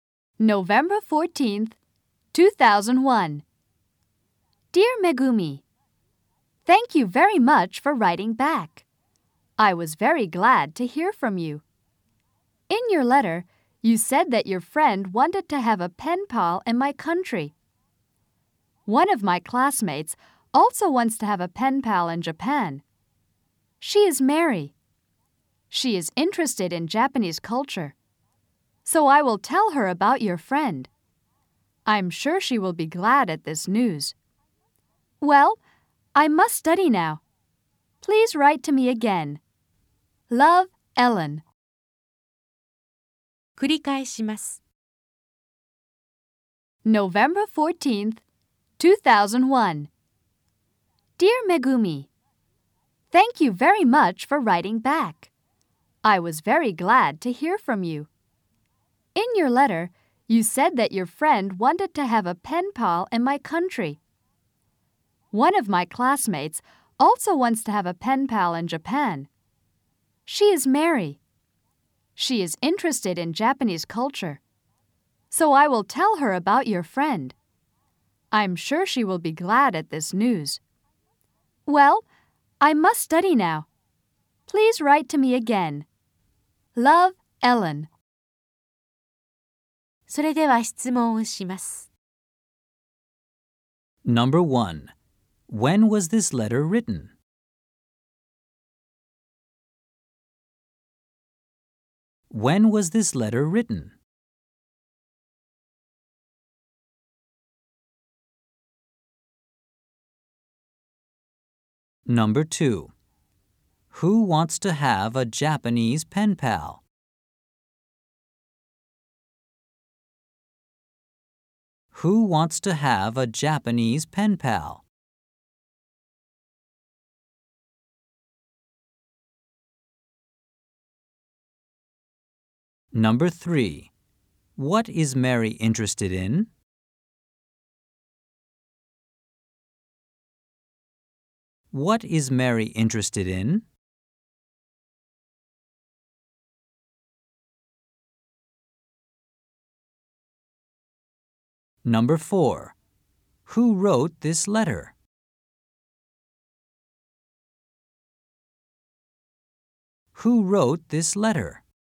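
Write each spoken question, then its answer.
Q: When was this letter written?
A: November 14th, 2001

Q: Who wants to have a Japanese pen pal?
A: Mary

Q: What is Mary interested in?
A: Japanese culture

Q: Who wrote this letter?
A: Ellen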